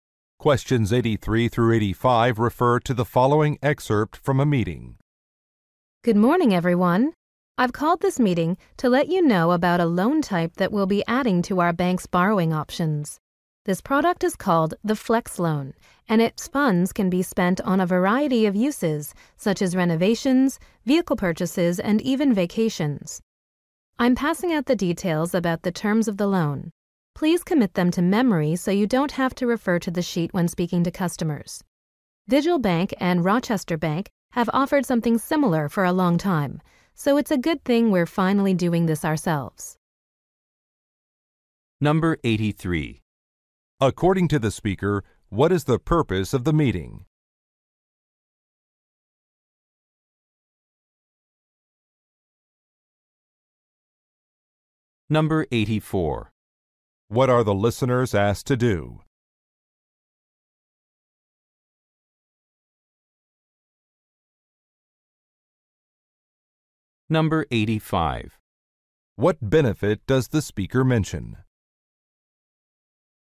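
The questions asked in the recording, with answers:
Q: According to the speaker, what is the purpose of the meeting?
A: To announce a new loan product

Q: What are the listeners asked to do?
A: Memorize the loan terms

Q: What benefit does the speaker mention?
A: The funds can be used for many purposes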